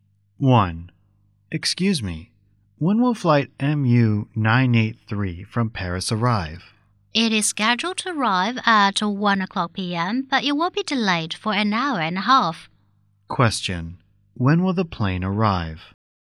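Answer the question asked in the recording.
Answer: At 2:30 p.m.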